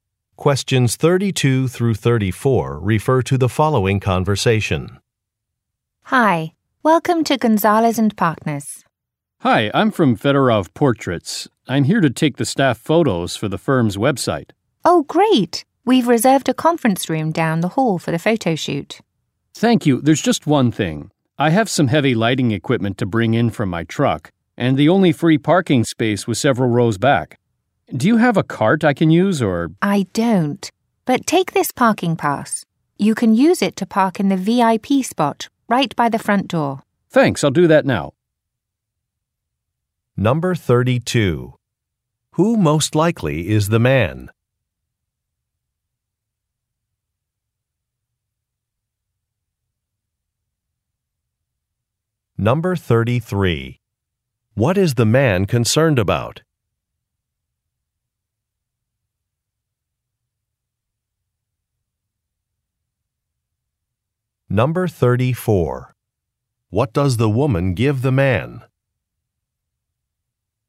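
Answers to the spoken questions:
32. A photographer
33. Carrying heavy equipment from a distant parking space
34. A parking pass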